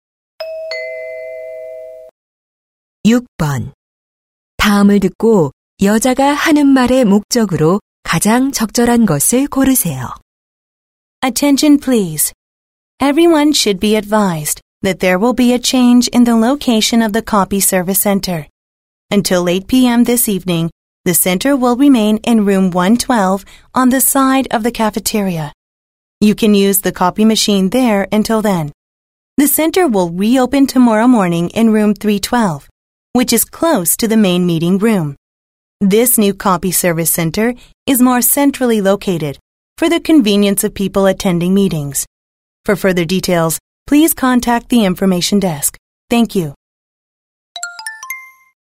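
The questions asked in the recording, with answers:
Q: 다음을 듣고 여자가 하는 말의 목적으로 가장 적절한 것을 고르세요.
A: 복사 서비스 센터 위치 변경 안내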